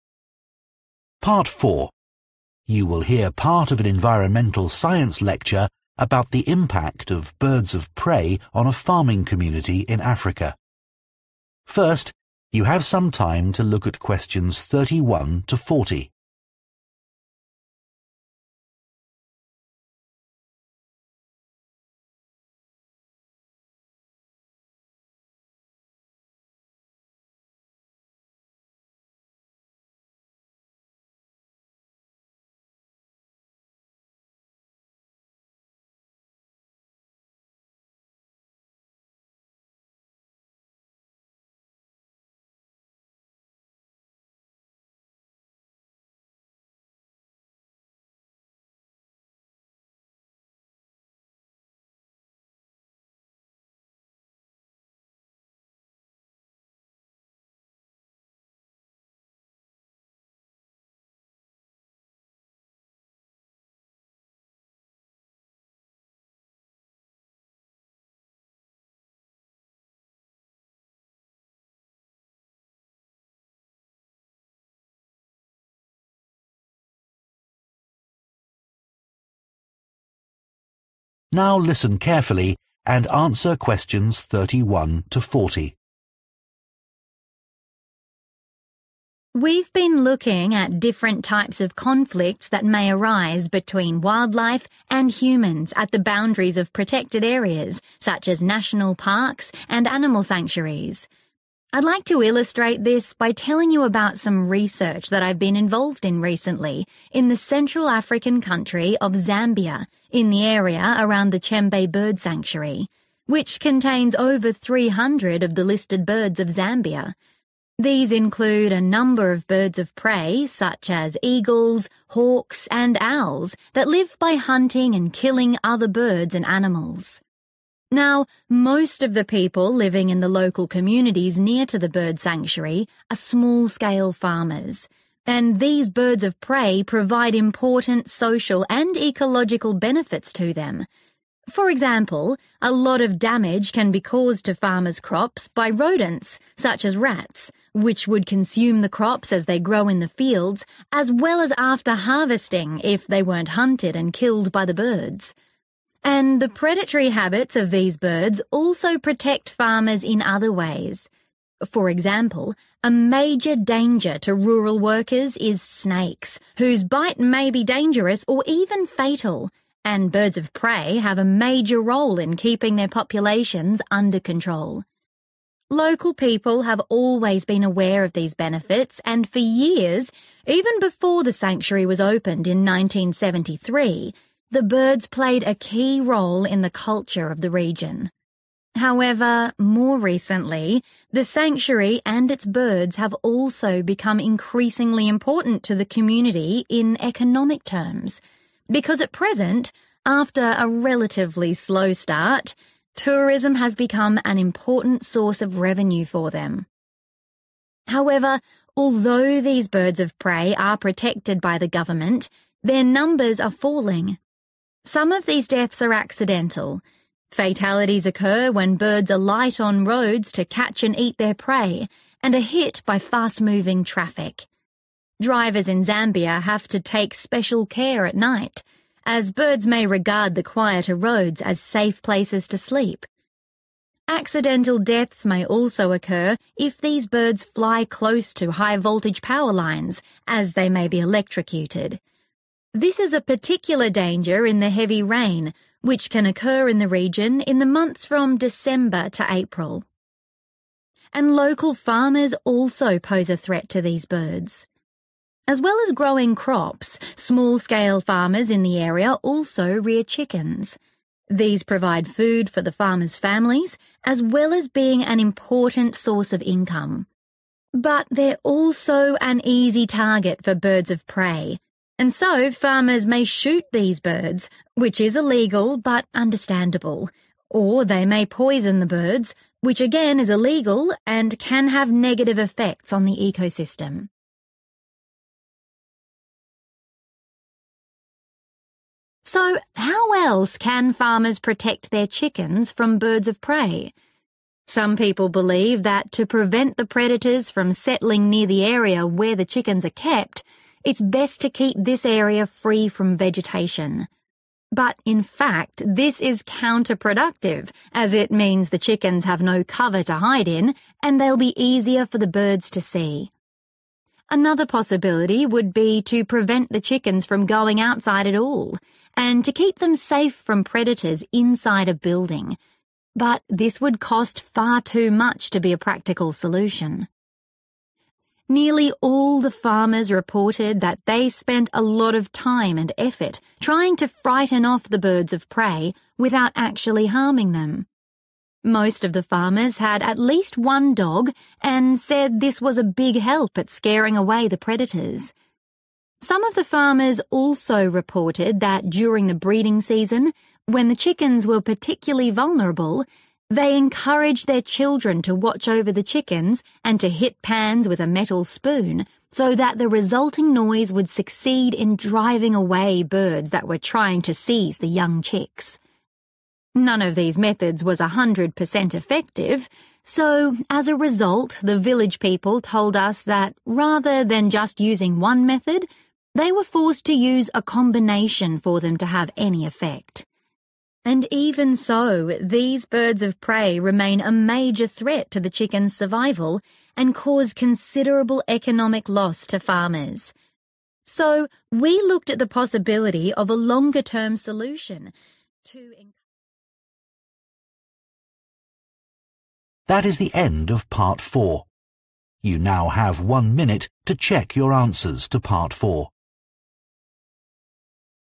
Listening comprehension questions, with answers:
Complete the notes below. Write ONE WORD ONLY for each answer.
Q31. They destroy 31............... and other rodents.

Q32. They help to prevent farmers from being bitten by 32................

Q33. They now support the economy by encouraging 33............... in the area.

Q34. by 34............... when they are hunting or sleeping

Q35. by electrocution from contact with power lines, especially at times when there is a lot of 35...............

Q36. Local farmers may illegally shoot them or 36............... them.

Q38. keeping a 38..............................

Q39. making a 39............... (e.g. with metal objects)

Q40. a 40............... if method is usually most effective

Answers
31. rats
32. snakes
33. tourism
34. traffic
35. rain
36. poison
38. dog
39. noise
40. combination